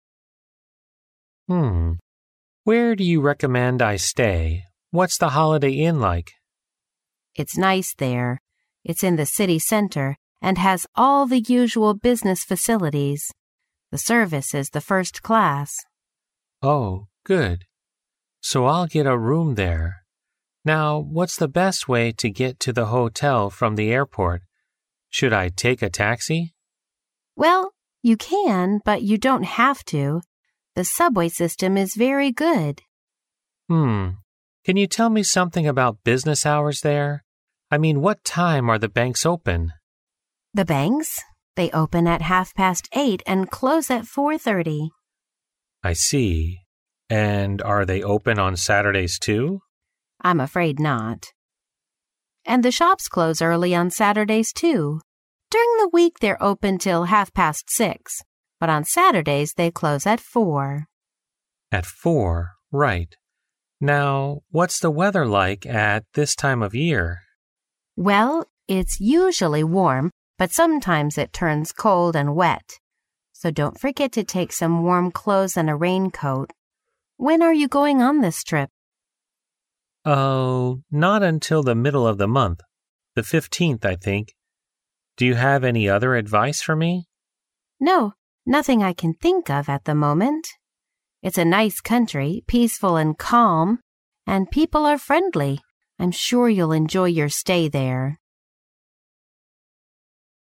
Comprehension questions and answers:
Conversation One Listen to the conversation, and mark each statement as either true (T) or false (F) according to what you hear.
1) The two speakers are talking about preparing for a trip.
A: 对

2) The man will probably take a taxi to go to the hotel.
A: 错

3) The banks open at half past nine during the week.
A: 错

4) The weather there is usually warm but sometimes cold and wet in this season.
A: 对

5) The man will leave for the trip at the end of the week.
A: 错

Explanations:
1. 对话开始提到了inn,subway,banks等服务设施,尤其是女士倒数第二次回答男士问题时提到"When are you going on this trip?"由此可知对话是有关旅行。故该说法正确。
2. 当男士询问是否需要从机场乘出租车到酒店时,女士明确表示"The subway system is very good",由此可知女士建议他乘地铁,没有必要乘坐出租车。故该说法错误。
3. 女士明确提到"The banks? They open at half past eight and close at four thirty. ",由此可知银行是八点半开门,而不是九点半。故该说法错误。
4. 女士在介绍天气时提到"Well, it's usually warm, but sometimes it turns cold and wet"。故该说法正确。
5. 当女士询问男士何时出发时,男士回答"...the middle of the month. The fifteenth",即本月15号,并没有提到本周末。故该说法错误。

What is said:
A
[听力原文] M: Mm..., where do you recommend I stay? What's the Holiday Inn like? W: It's nice there. It's in the city centre and has all the usual business facilities. The service is the first class. M: Oh, good. So I'll get a room there. Now, what's the best way to get to the hotel from the airport? Should I take a taxi? W: Well, you can, but you don't have to. The subway system is very good. M: Mm..., can you tell me something about business hours there? I mean, what time are the banks open? W: The banks? M: I see. And are they open on Saturdays, too? W: I'm afraid not, and the shops close early on Saturdays, too. During the week they're open until half past six, but on Saturdays they close at four. Right. Now, what's the weather like at this time of year? W: Well, it's usually warm, but sometimes it turns cold and wet. So don't forget to take some warm clothes and a raincoat. When are you going on this trip? M: Oh, not until the middle of the month. The fifteenth, I think. Do you have any other advice for me? W: No, nothing I can think of at the moment. It's a nice country, peaceful and calm, and people are friendly. I'm sure you'll enjoy your stay there.